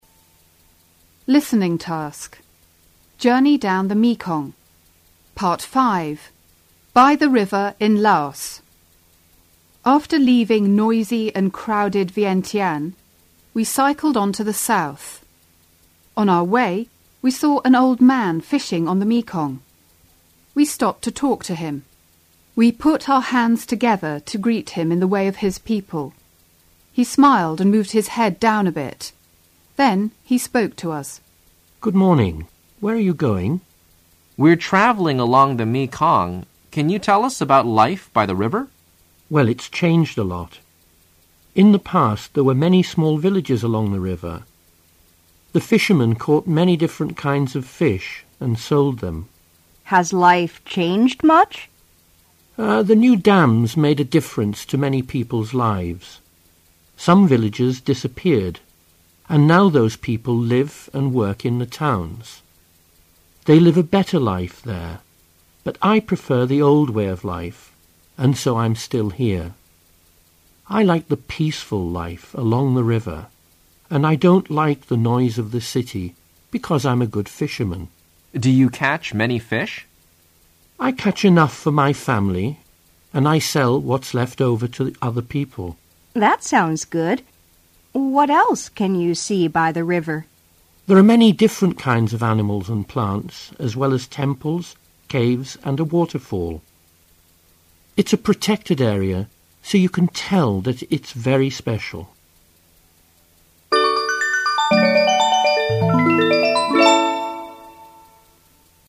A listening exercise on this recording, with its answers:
1. Listen and write the main idea in one sentence.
Listen and write the main idea in one sentence.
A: Wang Kun and Wang Wei met an old man fishing by the river in Laos , and they talked about the life on the river and the changes.

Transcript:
JOUNRNEY DOWN THE MEKONG Part 5 BY THE RIVER IN LOAOS After leaving noisy and crowded vientiane ,we cycled on to the south.On our way we saw an old man fishing on the Mekong.We stopped to talk to him.Weput our hands together to greet him in the way of his poeple.He smiled and moved his head down a bit.Then he spoke to us. WK: We're travelling along the Mekong.Can you tell us about life by the river? M: Well,it's changed a lot.In the past there were many snall villages along the river.The fisherman caught many different kinds of fish and sold them. WW: Has life changed much? M: Er,the new dams made a difference to many people's lives. Some villages disappeared and now many people live and work in the towns.They live a better life there,but Iprefer the old way of life along the river and I don't like the noise of the city because I am a good fisherman. WK: Do you catch many fish? M: I catch enough for my family and I sell what's left over to other people. WW: That sounds good. What else can you by the river? M: There are many different kinds of animals and plants as well as temples,caves and a waterfall. It's a protected area so you can tell that it's very special.